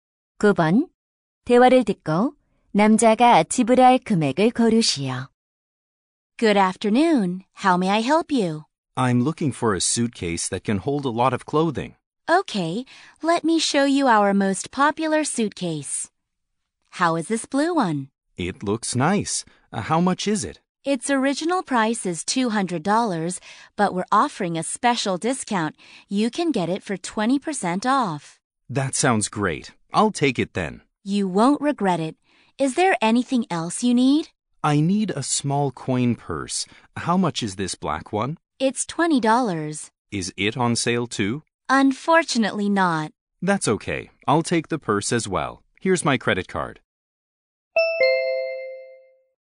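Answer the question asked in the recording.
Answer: $180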